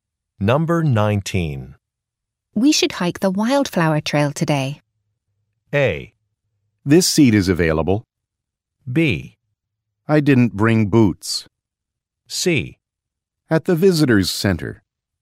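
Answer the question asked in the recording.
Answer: B: I didn't bring boots.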